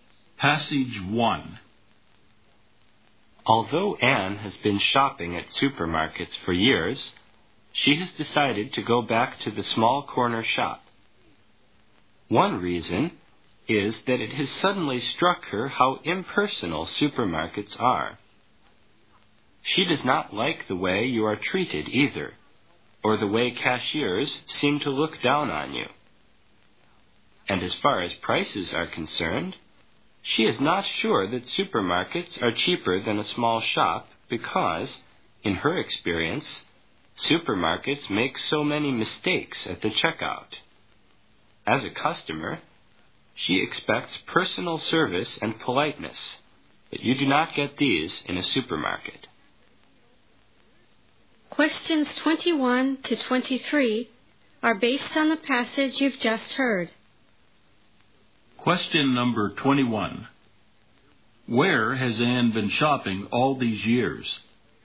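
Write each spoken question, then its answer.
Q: Where has Anne been shopping all these years?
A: At supermarkets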